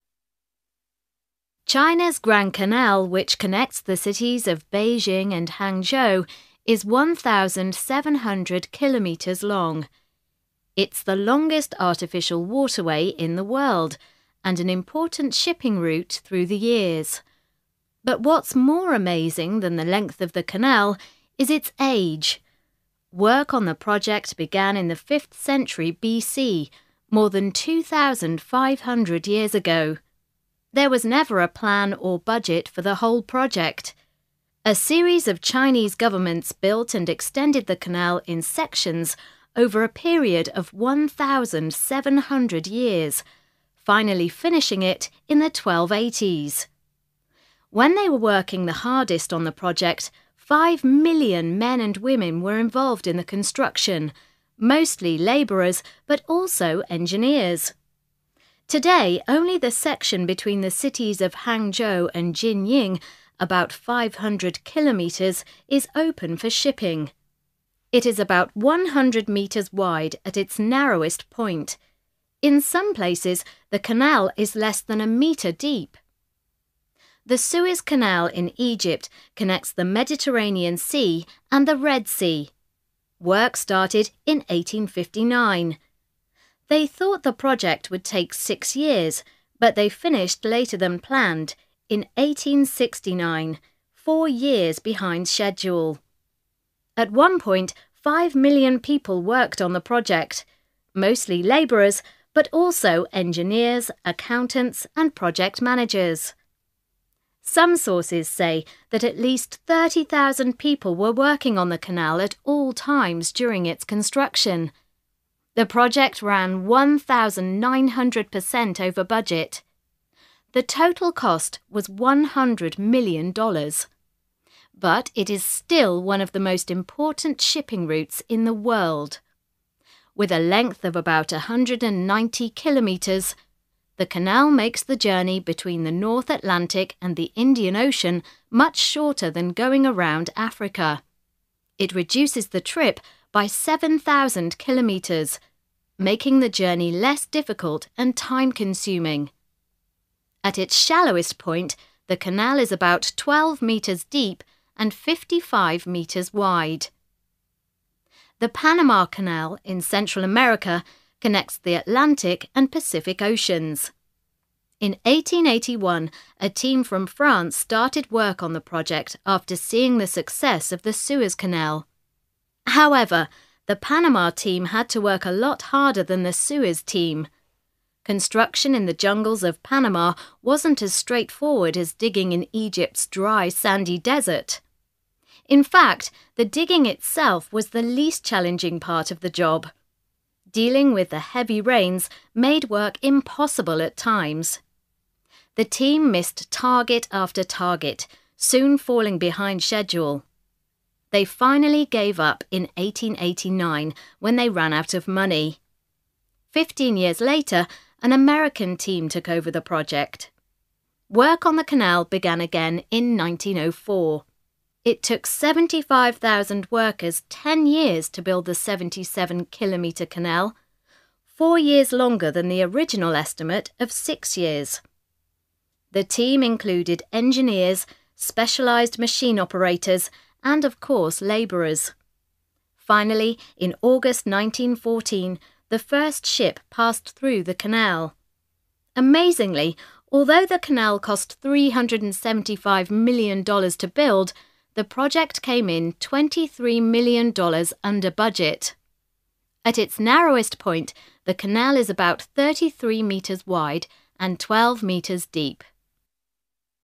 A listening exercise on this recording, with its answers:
A. Listen and complete the extracts.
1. It's the ................... artificial waterway in the world.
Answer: longest

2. But what's ................... than the length of the canal is its age.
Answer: more amazing

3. When they were working the ................... on the project, five million men and women were involved in the construction.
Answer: hardest

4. They finished ................... than planned.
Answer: later

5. It is still one of the ................... shipping routes in the world.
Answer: most important

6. The canal makes the journey between the North Atlantic and the Indian Ocean much ................... than going around Africa.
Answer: shorter

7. It reduces the trip by 7,000 kilometres, making the journey ................... and time-consuming.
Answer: less difficult

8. The Panama team had to work a lot ................... than the Suez team.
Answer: harder

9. Construction in the jungles of Panama wasn't ................... digging in Egypt's dry, sandy desert.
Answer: as straightforward as

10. In fact the digging itself was the ................... part of the job.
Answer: least challenging

B. Listen again. Complete the information about each project.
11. Length: (1)............... km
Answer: 1,700

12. The schedule: none – took about (2)............... years to complete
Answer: 1,700

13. The team: (3)............... million men and women – mostly labourers and engineers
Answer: five

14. The schedule: late by (4)............... years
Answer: four

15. The team: (5)............... million people in total, (6)............... at any given time – labourers, engineers, accountants, project managers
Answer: 30,000

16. The cost: $100 million, over budget by (7)............... percent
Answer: 1,900

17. Length: (8)............... km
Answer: 190

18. Minimum width: (9)............... m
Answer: 55

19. Length: (10)............... km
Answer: 77

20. The schedule: the American project was late by (11)............... years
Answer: four

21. The cost: $(12)............... million – $23 million under budget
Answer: 375

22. Minimum width: (13)............... m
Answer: 33

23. Minimum depth: (14)............... m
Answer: 12

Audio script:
China's Grand Canal, which connects the cities of Beijing and Hangzhou is 1,700 kilometres long. It's the longest artificial waterway in the world, and an important shipping route through the years. But what's more amazing than the length of the canal is its age. Work on the project began in the fifth century BC – more than 2,500 years ago. There was never a plan or budget for the whole project. A series of Chinese governments built and extended the canal in sections over a period of 1,700 years, finally finishing it in the 1280s. When they were working the hardest on the project, five million men and women were involved in the construction – mostly labourers, but also engineers. Today, only the section between the cities of Hangzhou and Jining– about 500 kilometres – is open for shipping. It is about 100 metres wide at its narrowest point.
In some places, the canal is less than a metre deep. The Suez Canal in Egypt connects the Mediterranean Sea and the Red Sea. Work started in 1859. They thought the project would take six years, but they finished later than planned, in 1869 – four years behind schedule. At one point five million people worked on the project – mostly labourers, but also engineers, accountants and project managers.
Some sources say that at least 30,000 people were working on the canal at all times during its construction. The project ran 1,900 percent over budget. The total cost was $100 million. But it is still one of the most important shipping routes in the world. With a length of about 190 kilometres, the canal makes the journey between the North Atlantic and the Indian Ocean much shorter than going around Africa. It reduces the trip by 7,000 kilometres, making the journey less difficult and time-consuming. At its shallowest point, the canal is about twelve metres deep and fifty-five metres wide.
The Panama Canal, in Central America, connects the Atlantic and Paci c Oceans. In 1881, a team from France started work on the project after seeing the success of the Suez Canal. However, the Panama team had to work a lot harder than the Suez team. Construction in the jungles of Panama wasn't as straightforward as digging in Egypt's dry, sandy desert. In fact the digging itself was the least challenging part of the job. Dealing with the heavy rains made work impossible at times. The team missed target after target, soon falling behind schedule. They finally gave up in 1889, when they ran out of money. Fifteen years later, an American team took over the project. Work on the canal began again in 1904. It took 75,000 workers ten years to build the seventy-seven-kilometre canal – four years longer than the original estimate of six years. The team included engineers, specialized machine operators and of course labourers. Finally, in August 1914, the first ship passed through the canal. Amazingly, although the canal cost $375 million to build, the project came in $23 million under budget.